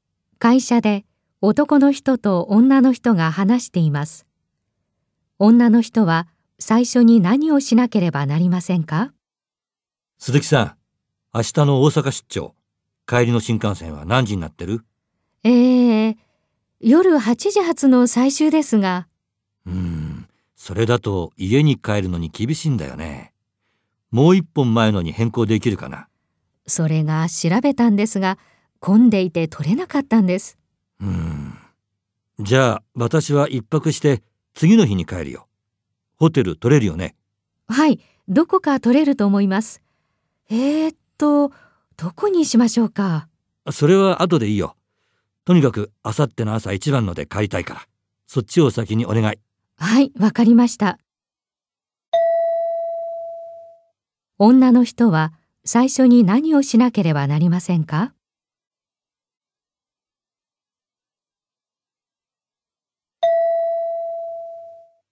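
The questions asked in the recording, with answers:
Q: 女の人は最初に何をしなければなりませんか?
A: 明後日の朝一番の新幹線を予約する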